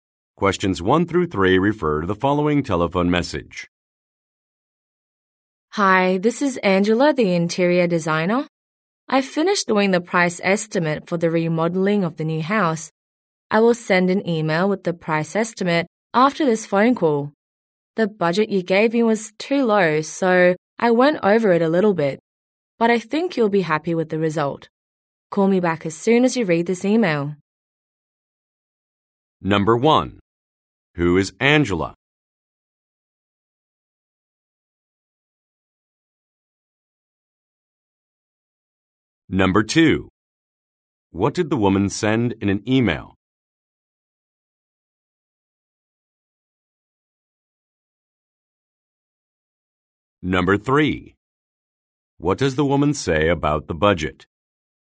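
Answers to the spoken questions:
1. An interior designer
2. A price estimate
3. It was too low, so she went over it a little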